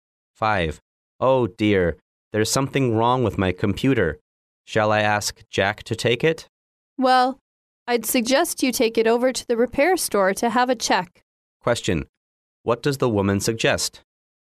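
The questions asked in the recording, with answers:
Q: What does the woman suggest?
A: Taking the computer to the repair store for a check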